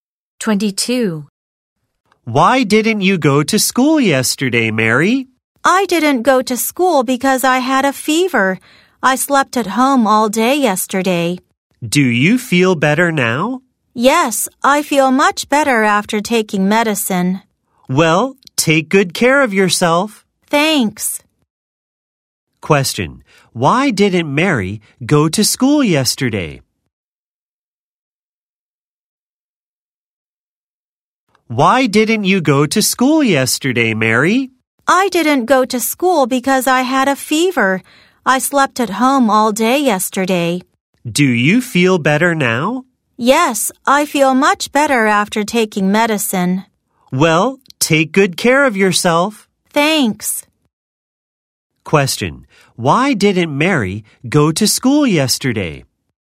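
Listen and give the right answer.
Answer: She had a fever.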